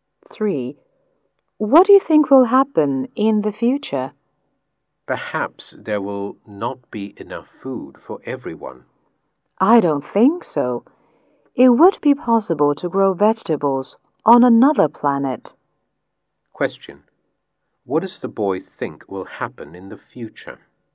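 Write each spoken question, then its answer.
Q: What does the boy think will happen in the future?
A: It will be possible to grow vegetables on another planet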